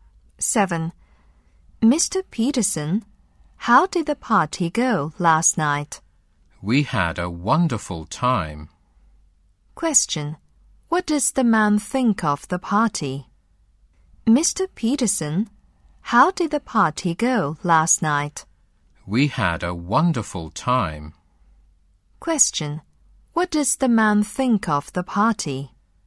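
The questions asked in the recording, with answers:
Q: What does the man think of the party?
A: It was wonderful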